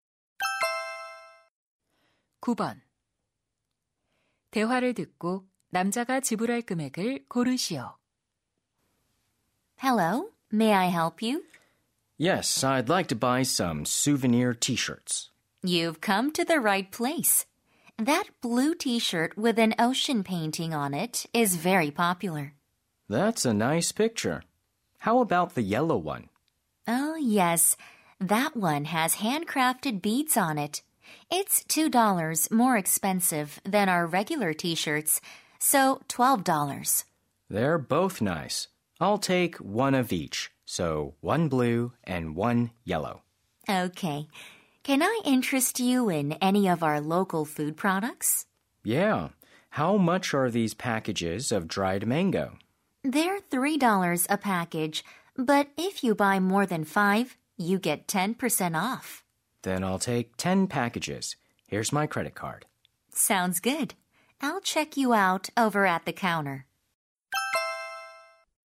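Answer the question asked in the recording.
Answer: $49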